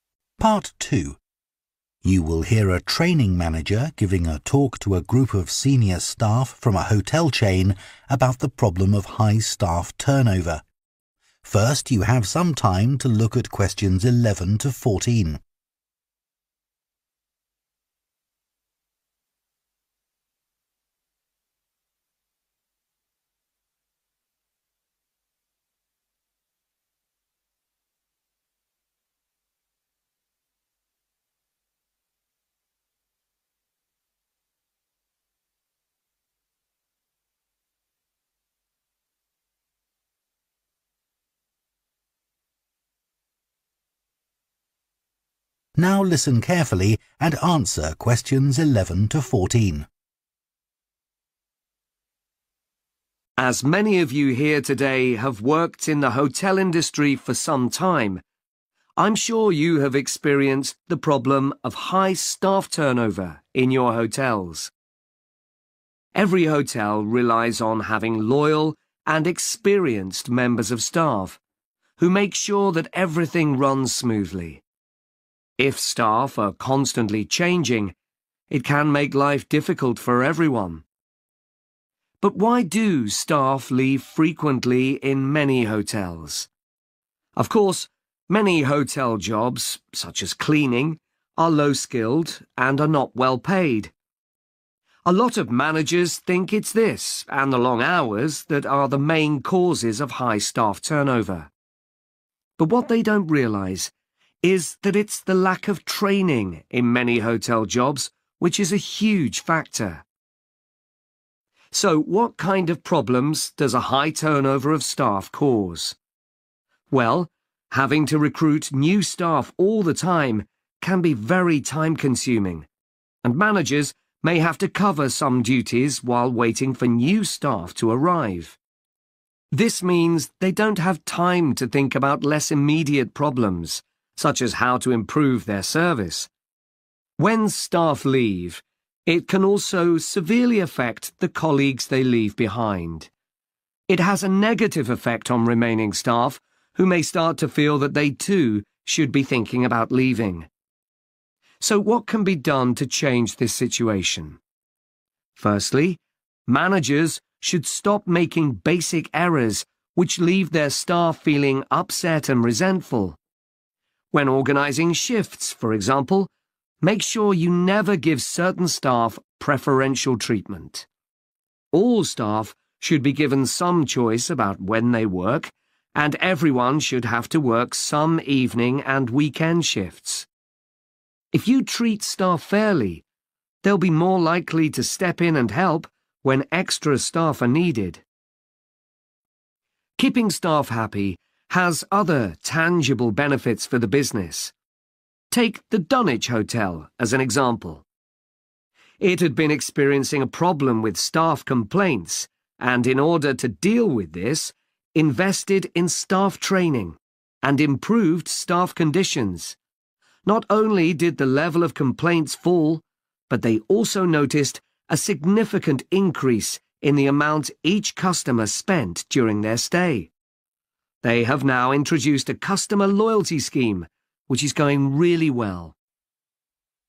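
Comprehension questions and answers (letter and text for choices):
Choose the correct letter, A, B or C.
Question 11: Many hotel managers are unaware that their staff often leave because of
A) a lack of training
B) long hours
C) low pay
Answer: A) a lack of training

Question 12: What is the impact of high staff turnover on managers?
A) an increased workload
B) low morale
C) an inabillty to meet targets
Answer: A) an increased workload

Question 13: What mistake should managers always avoid?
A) failing to treat staff equally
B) reorganising shifts without warning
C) neglecting to have enough staff during busy periods.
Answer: A) failing to treat staff equally

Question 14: What unexpected benefit did Dunwich Hotel notice after improving staff retention rates?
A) a fall in customer complaints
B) an increase in loyalty club membership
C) a rise in spending per customer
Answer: C) a rise in spending per customer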